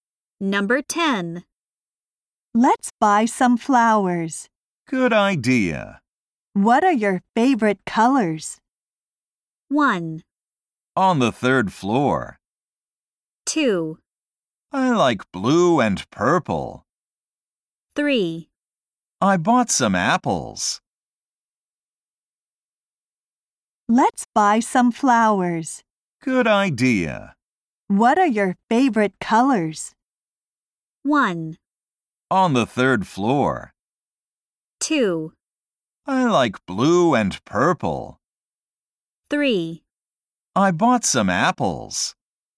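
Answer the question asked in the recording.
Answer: 2: I like blue and purple.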